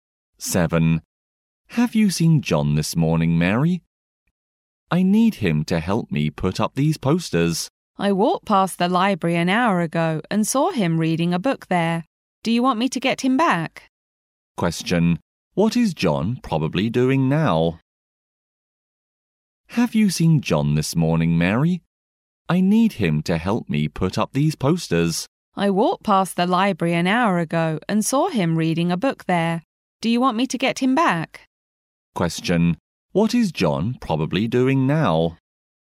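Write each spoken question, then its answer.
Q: What is John probably doing now?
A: Reading a book in the library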